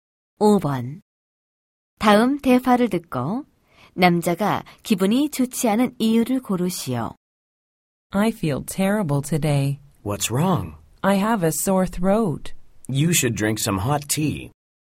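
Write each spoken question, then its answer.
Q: 다음 대화를 듣고 남자가 기분이 좋지 않은 이유를 고르시오.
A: 목이 아파서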